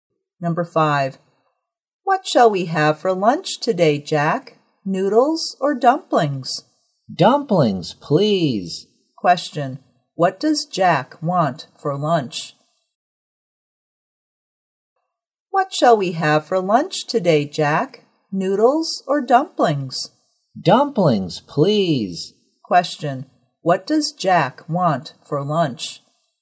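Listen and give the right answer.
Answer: Dumplings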